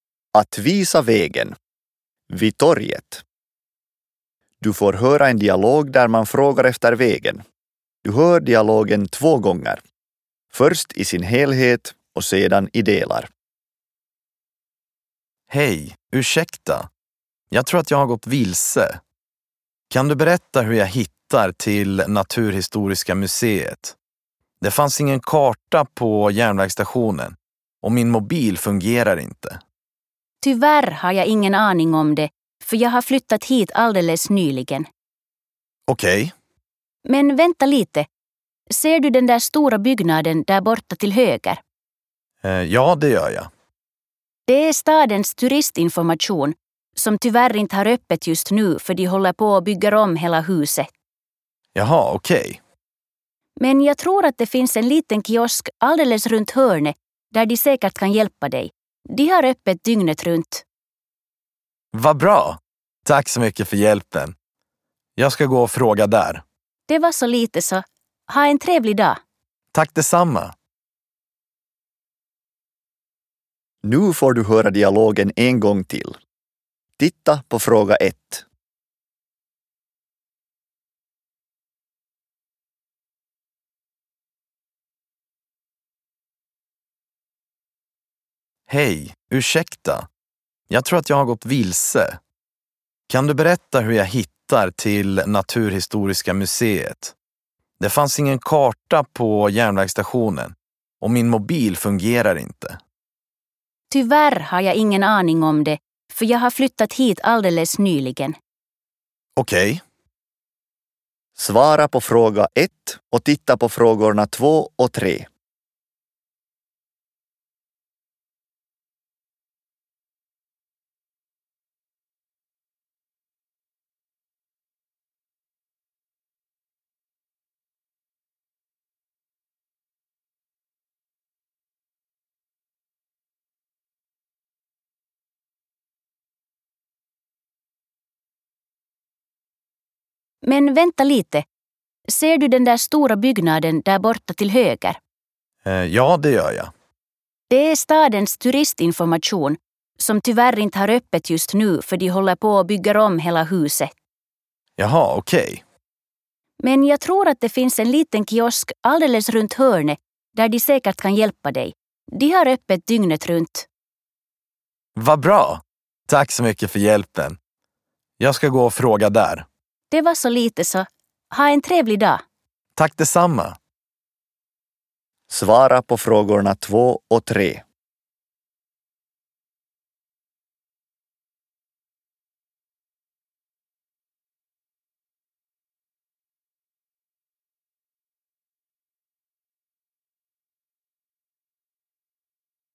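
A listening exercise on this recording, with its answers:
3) Mitä Jonas etsii?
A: Erästä nähtävyyttä

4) Mitä turisti-infosta kerrotaan?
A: Se on suljettu remontin vuoksi

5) Mitä Jonasta neuvotaan tekemään?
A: kysymään kioskilta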